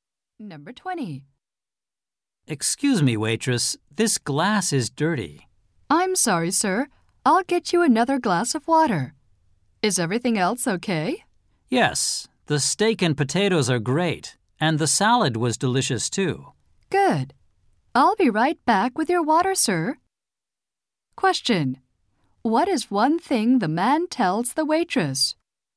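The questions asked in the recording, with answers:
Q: Question. What is one thing the man tells the waitress?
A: His glass is dirty.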